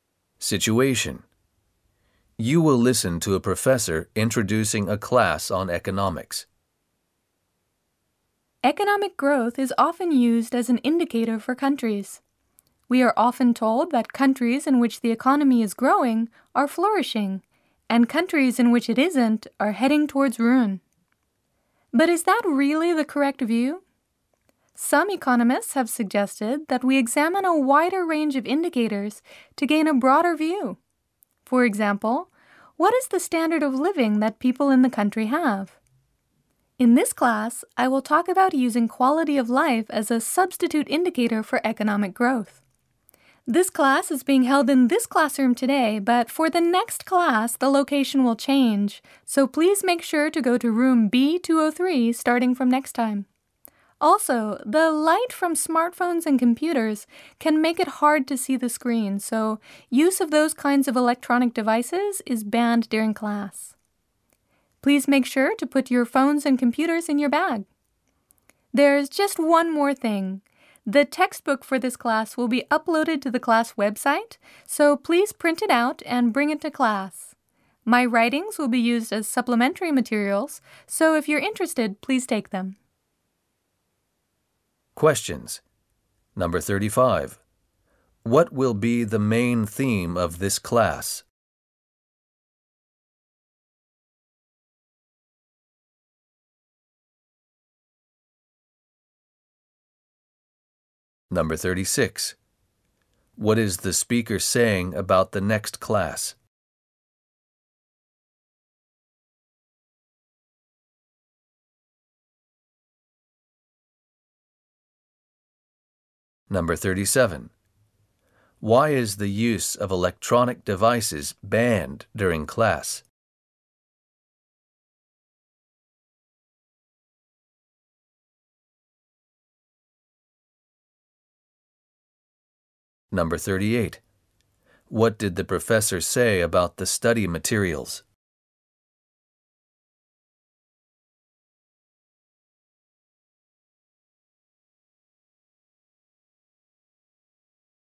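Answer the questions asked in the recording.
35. Using quality of life as a substitute indicator for economic growth
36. It will be held in room B203
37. Their light can make it hard to see the screen
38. The textbook will be uploaded to the class website to print out and bring; the professor's writings are optional supplementary materials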